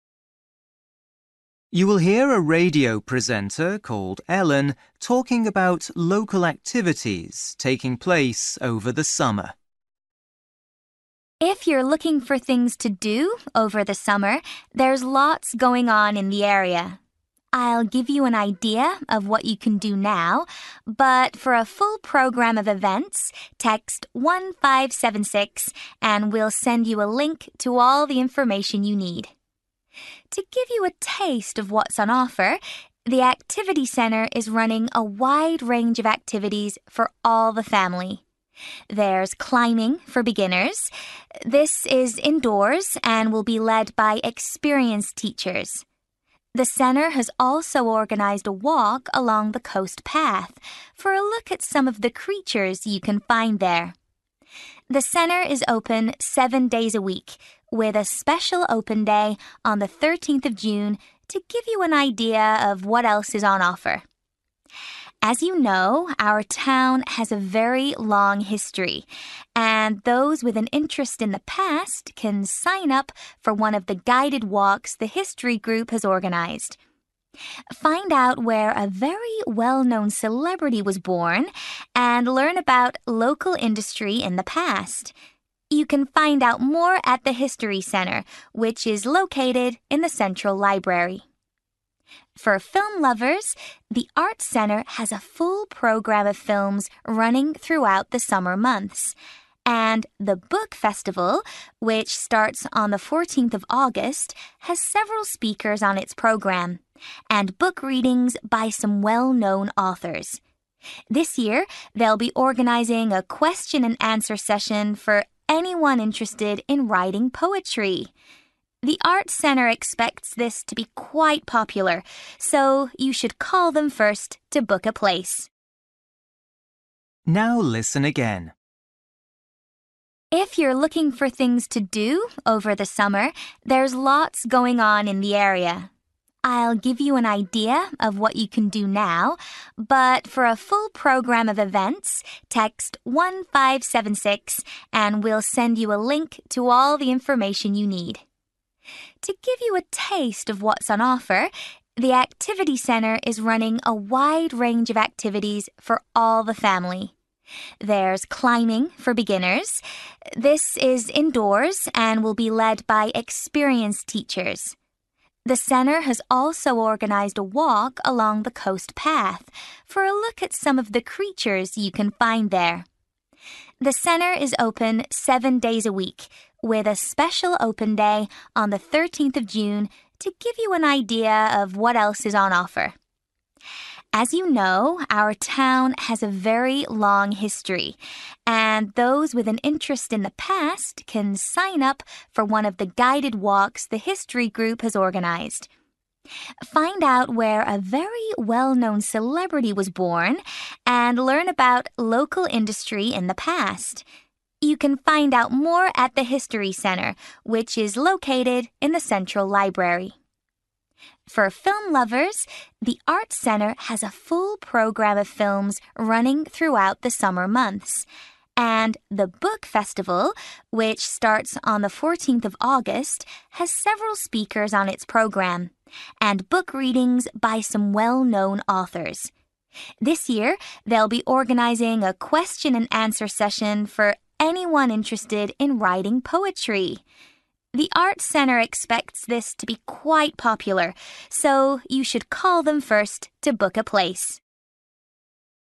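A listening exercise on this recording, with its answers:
For each question, write the correct answer in the gap. Write one or two words or a number or a date or a time. You will hear a radio presenter called Ellen talking about activities taking place over the summer.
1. For a full programme of events, text (1)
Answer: 1576

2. The Activity Centre is running indoor (2) sessions for beginners.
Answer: climbing

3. There are also walks along the (3) to learn about the local wildlife.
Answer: coast path

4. The Activity Centre is running an open day on (4) June.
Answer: 13th

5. On the History Group walk you can learn about a famous (5) who was born in the area.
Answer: celebrity

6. If you're interested in writing (6) don't forget to book a place with the Arts Centre.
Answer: poetry

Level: Luyện nghe trình độ B1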